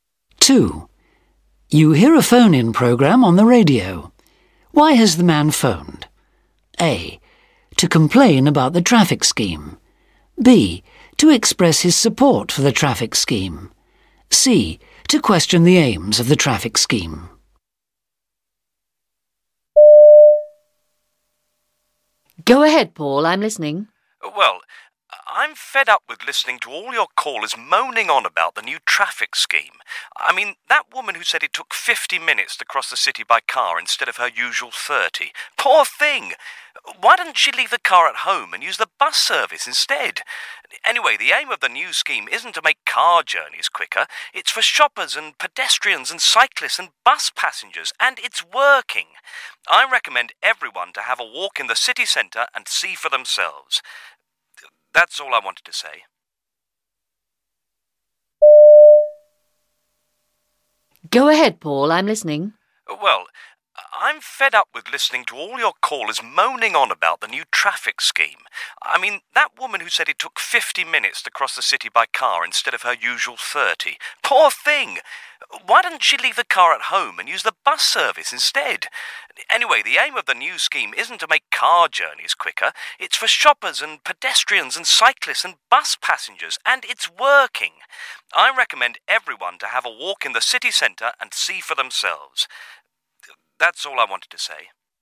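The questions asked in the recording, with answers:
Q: Why has the man phoned?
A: B: To express his support for the traffic scheme.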